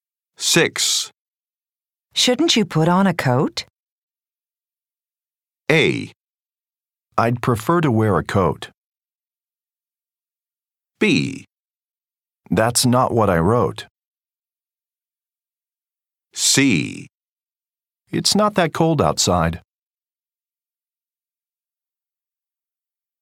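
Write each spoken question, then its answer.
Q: Shouldn't you put on a coat?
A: C: It's not that cold outside.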